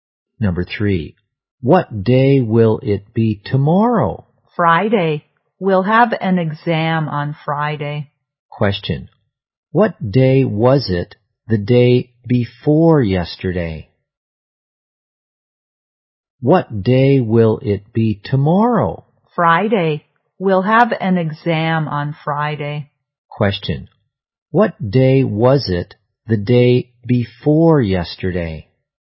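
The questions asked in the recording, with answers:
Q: What day was it the day before yesterday?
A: Tuesday.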